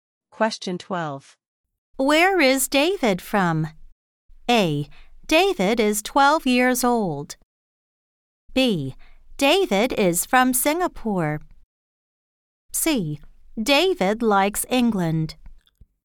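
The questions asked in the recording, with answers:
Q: Where is David from?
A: B: David is from Singapore.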